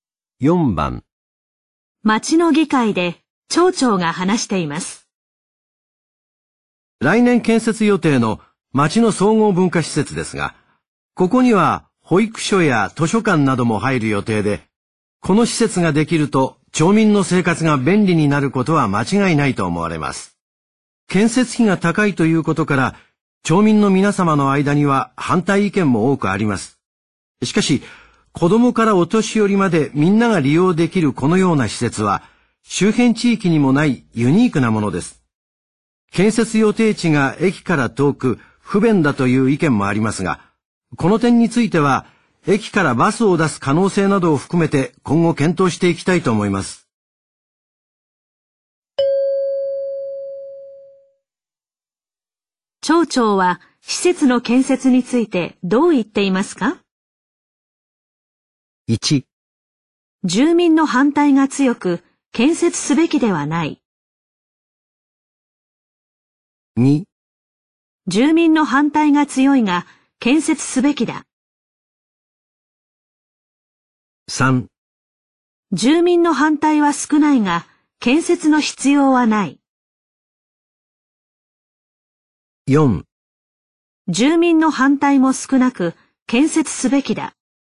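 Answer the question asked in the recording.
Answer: 2: 住民の反対が強いが、建設すべきだ。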